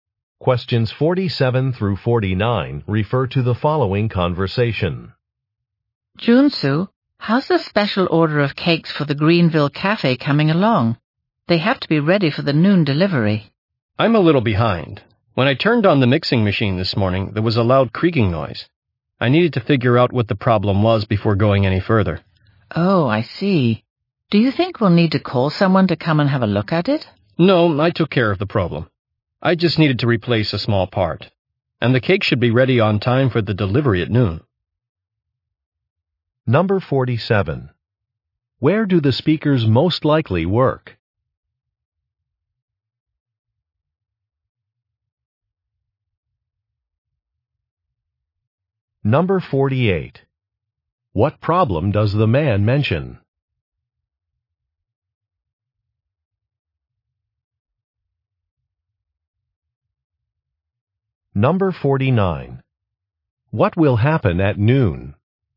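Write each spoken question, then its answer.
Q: Where do the speakers most likely work?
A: At a bakery

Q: What problem does the man mention?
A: The mixing machine made a loud creaking noise

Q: What will happen at noon?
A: The cakes will be delivered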